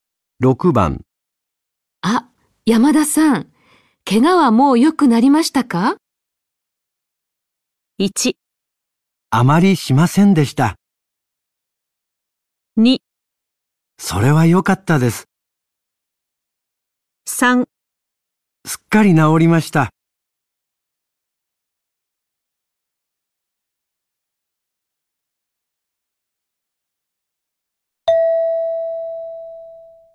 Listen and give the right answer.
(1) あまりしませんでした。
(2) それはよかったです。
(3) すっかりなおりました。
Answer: (3) すっかりなおりました。

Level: N4 Listening · Test 1